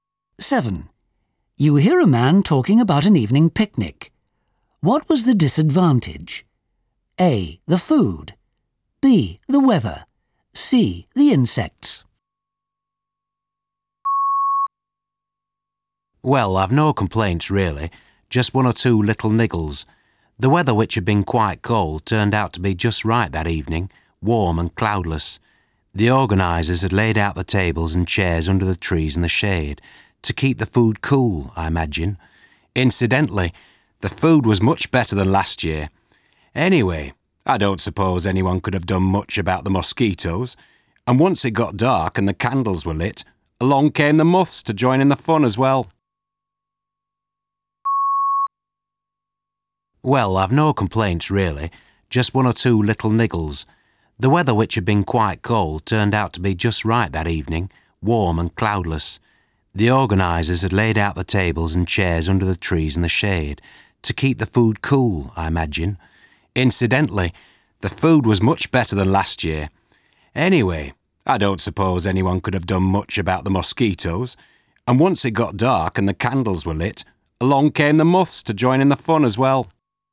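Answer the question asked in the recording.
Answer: C: The insects.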